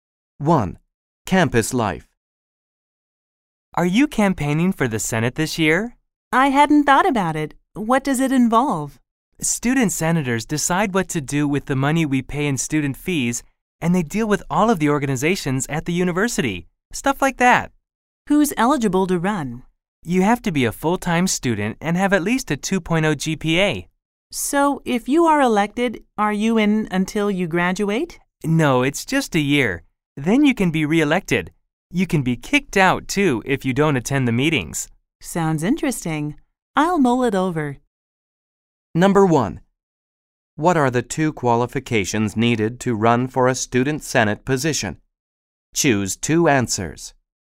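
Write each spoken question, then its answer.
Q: What are the two qualifications needed to run for a student senate position?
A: Being a full-time student and having at least a 2.0 GPA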